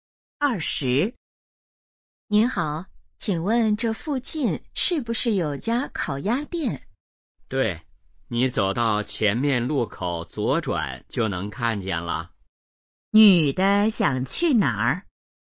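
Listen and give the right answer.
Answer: 烤鸭店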